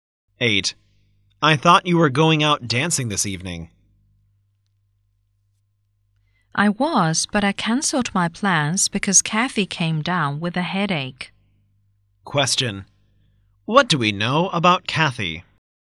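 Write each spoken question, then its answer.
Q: What do we know about Kathy?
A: She has a headache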